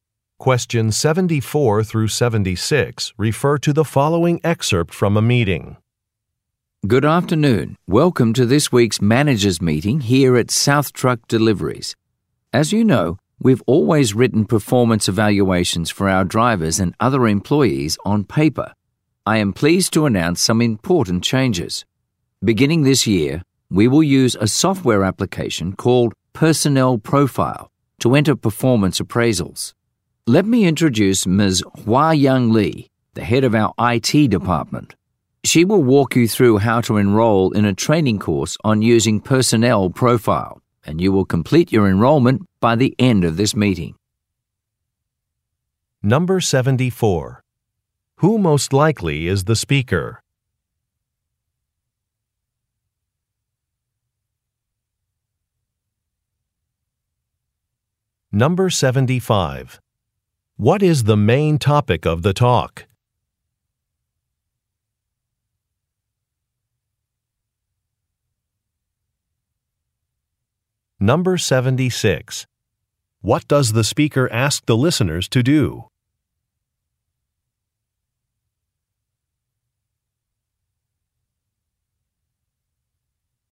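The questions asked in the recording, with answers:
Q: What is the main topic of the talk?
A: A new software application for performance evaluations

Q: What does the speaker ask the listeners to do?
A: Enroll in a training course on the software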